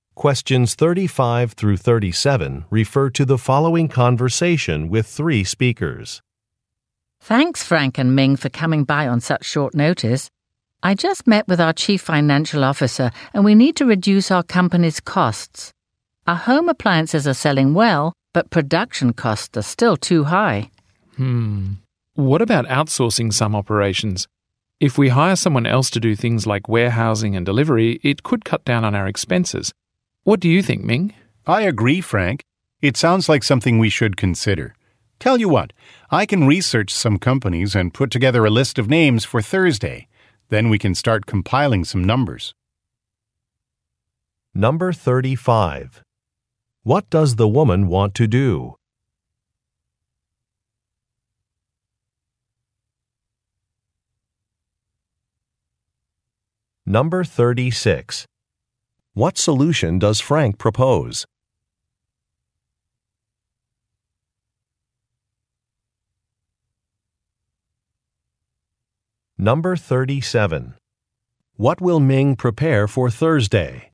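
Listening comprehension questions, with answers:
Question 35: What does the woman want to do?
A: Reduce the cost of operations

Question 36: What solution does Frank propose?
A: Hiring an outside company

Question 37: What will Ming prepare for Thursday?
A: A list of companies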